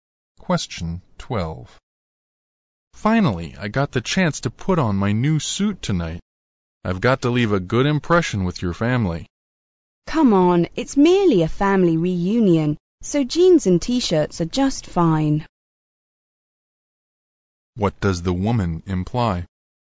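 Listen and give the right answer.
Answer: He doesn't need to dress formally; casual clothes are fine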